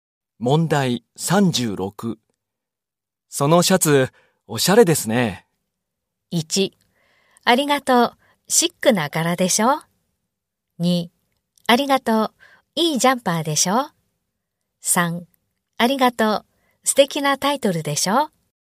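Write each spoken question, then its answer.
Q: そのシャツ、おしゃれですね。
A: 1: ありがとう、シックな柄でしょ。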